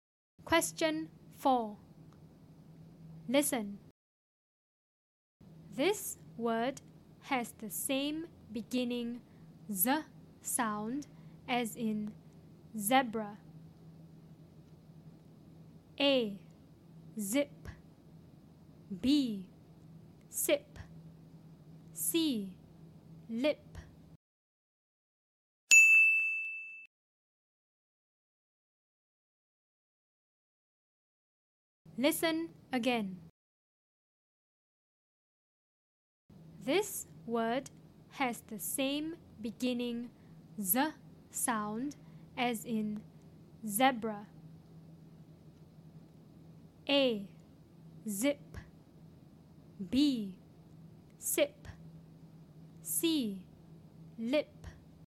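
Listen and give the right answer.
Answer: A: Zip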